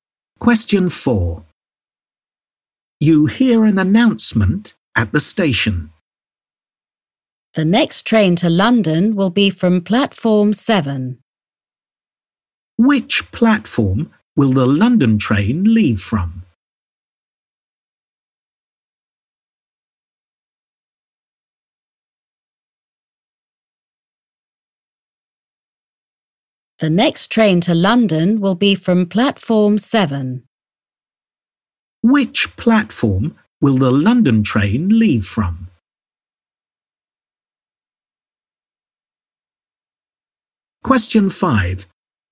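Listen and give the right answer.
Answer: Platform 7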